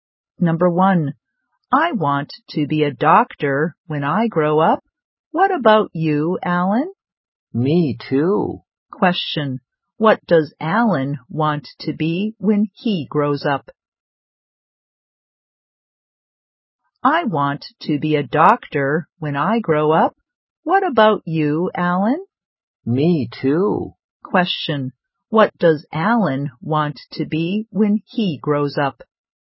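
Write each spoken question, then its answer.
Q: What does Alan want to be when he grows up?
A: A doctor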